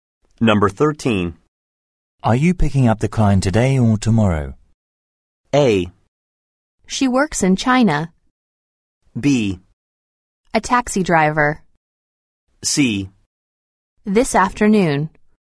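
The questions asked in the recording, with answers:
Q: Are you picking up the client today or tomorrow?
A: C: This afternoon.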